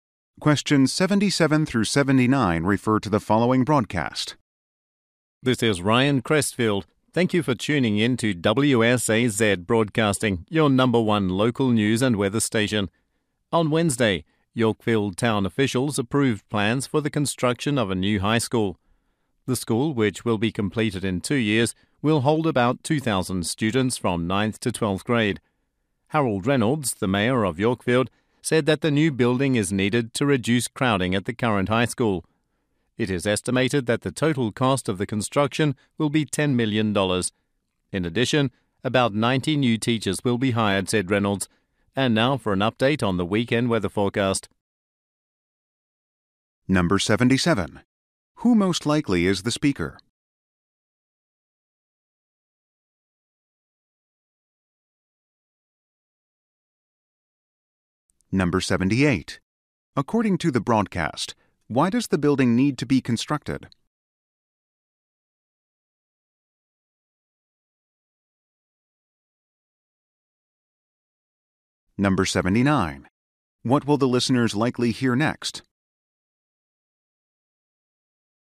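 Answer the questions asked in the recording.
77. A news broadcaster
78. To reduce crowding at the current high school
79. The weekend weather forecast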